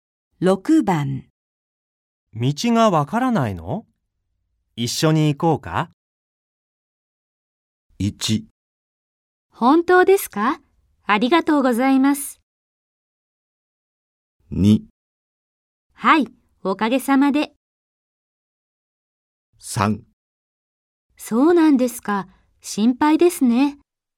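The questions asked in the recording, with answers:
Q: 道がわからないの?一緒に行こうか?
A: 1: 本当ですか?ありがとうございます。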